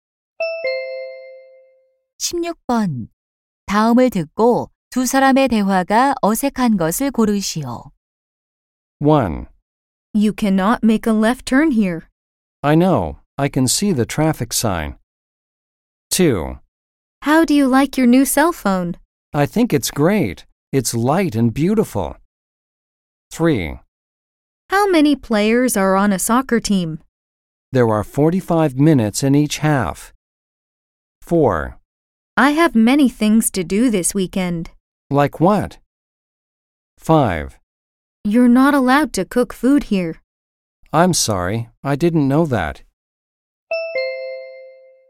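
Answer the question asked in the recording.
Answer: 3: How many players are on a soccer team? / There are 45 minutes in each half.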